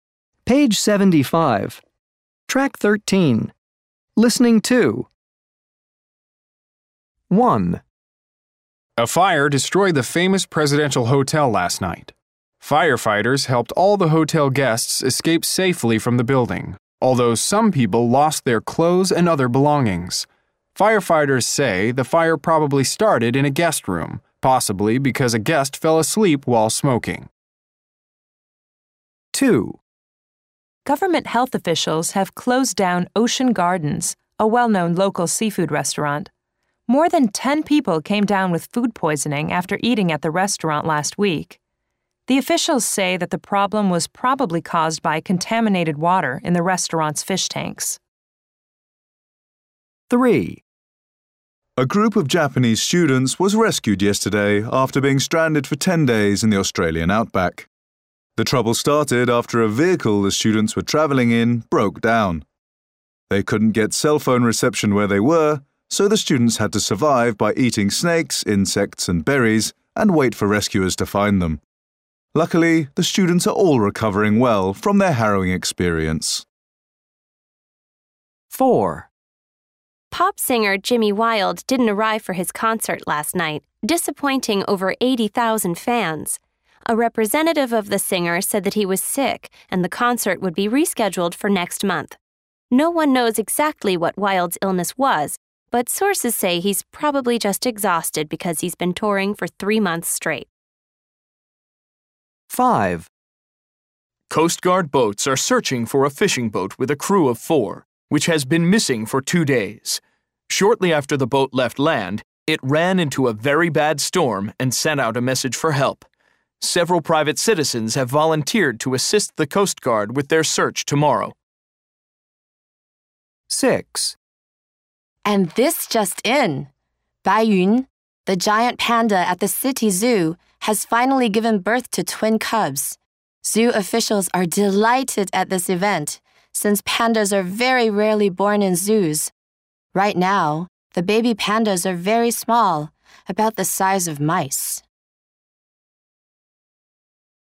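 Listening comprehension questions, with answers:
Task 2 Listen again. Are these statements about things that actually happened or things that probably happened? check the correct answer.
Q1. the fire started in a guest room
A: probably happened

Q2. more than ten people got food poisoning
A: actually happened

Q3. the student's vehicle broke down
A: actually happened

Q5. fishing crew sent out a call for help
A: actually happened

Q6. the baby pandas are very small right now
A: actually happened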